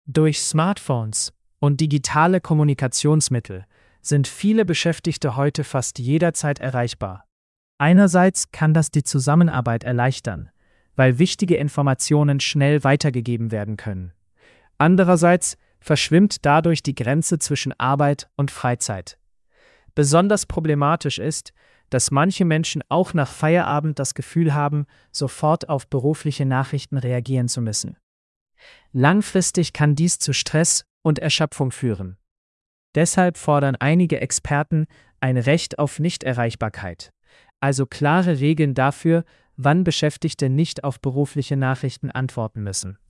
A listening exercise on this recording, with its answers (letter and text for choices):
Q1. Was ist ein Vorteil digitaler Erreichbarkeit?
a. Beschäftigte müssen nie mehr ins Büro gehen.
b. Informationen können schnell weitergegeben werden.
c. Freizeit wird länger.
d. Stress verschwindet vollständig.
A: b. Informationen können schnell weitergegeben werden.

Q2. Was ist laut Text problematisch?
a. Viele Menschen haben kein Smartphone.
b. Die Grenze zwischen Arbeit und Freizeit wird unklar.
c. Unternehmen kommunizieren zu wenig.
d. Beschäftigte arbeiten gar nicht mehr.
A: b. Die Grenze zwischen Arbeit und Freizeit wird unklar.

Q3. Was fordern einige Experten?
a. Ein Recht auf Nichterreichbarkeit.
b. Ein Verbot von Smartphones.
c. Mehr Arbeit am Wochenende.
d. Weniger digitale Kommunikation im Büro.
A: a. Ein Recht auf Nichterreichbarkeit.

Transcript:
Durch Smartphones und digitale Kommunikationsmittel sind viele Beschäftigte heute fast jederzeit erreichbar. Einerseits kann das die Zusammenarbeit erleichtern, weil wichtige Informationen schnell weitergegeben werden können. Andererseits verschwimmt dadurch die Grenze zwischen Arbeit und Freizeit. Besonders problematisch ist, dass manche Menschen auch nach Feierabend das Gefühl haben, sofort auf berufliche Nachrichten reagieren zu müssen. Langfristig kann dies zu Stress und Erschöpfung führen. Deshalb fordern einige Experten ein Recht auf Nichterreichbarkeit, also klare Regeln dafür, wann Beschäftigte nicht auf berufliche Nachrichten antworten müssen.

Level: C1-Niveau